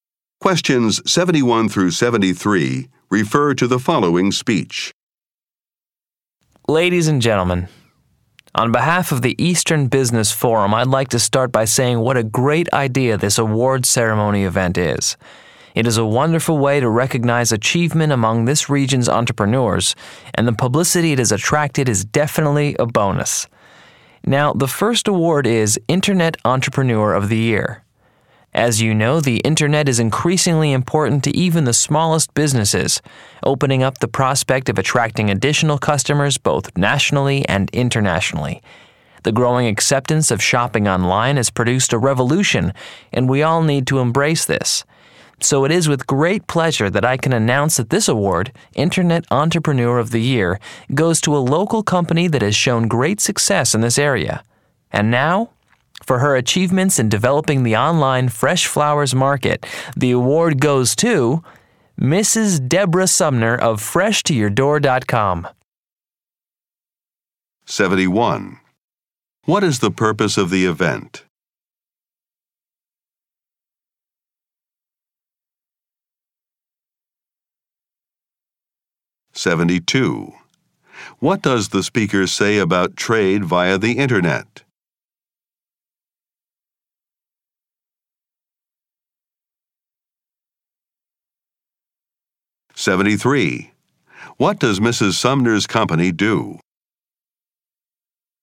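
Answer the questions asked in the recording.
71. To present business awards to local entrepreneurs
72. It is becoming increasingly important, even for small businesses
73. It sells fresh flowers online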